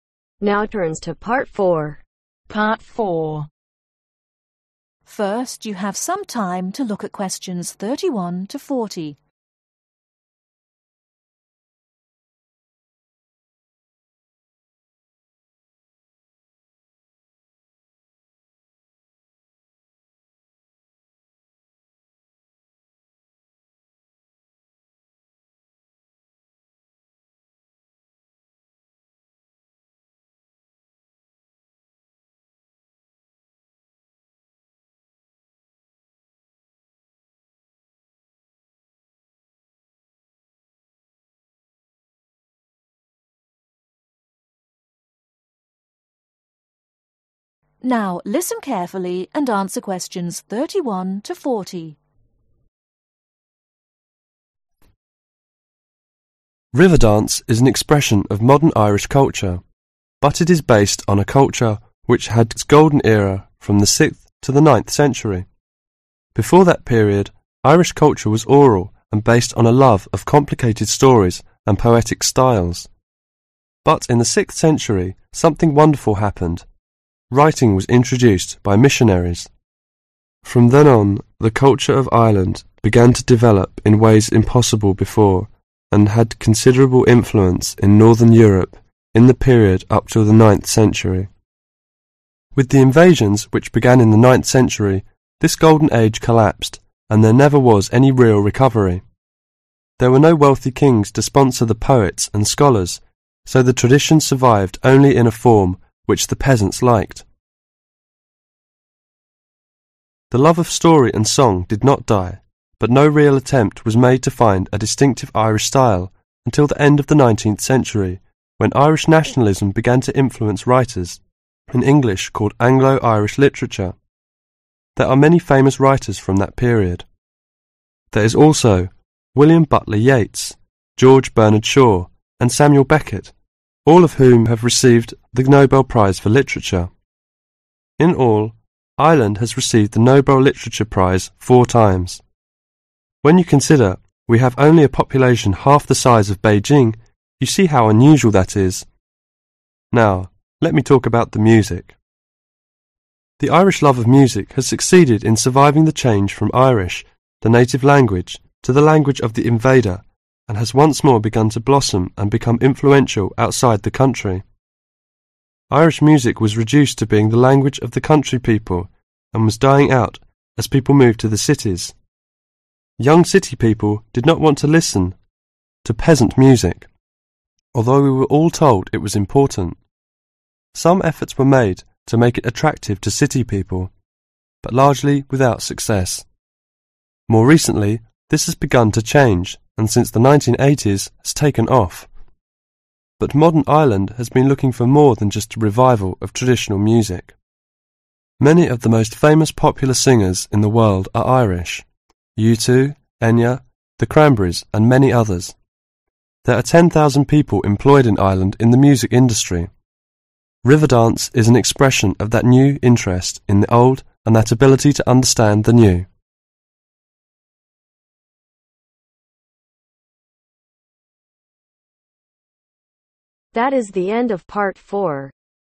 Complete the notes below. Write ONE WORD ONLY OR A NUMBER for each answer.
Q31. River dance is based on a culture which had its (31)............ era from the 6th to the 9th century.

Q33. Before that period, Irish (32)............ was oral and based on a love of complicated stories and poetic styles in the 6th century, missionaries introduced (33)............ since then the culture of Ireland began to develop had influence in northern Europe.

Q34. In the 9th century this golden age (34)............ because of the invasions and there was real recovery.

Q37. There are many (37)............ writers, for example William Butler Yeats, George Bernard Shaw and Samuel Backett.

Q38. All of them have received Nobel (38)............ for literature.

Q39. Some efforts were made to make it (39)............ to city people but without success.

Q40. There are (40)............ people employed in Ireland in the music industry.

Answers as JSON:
{"31": "Golden", "33": "Writing", "34": "Collapsed", "37": "Famous", "38": "Prize", "39": "Attractive", "40": "10,000"}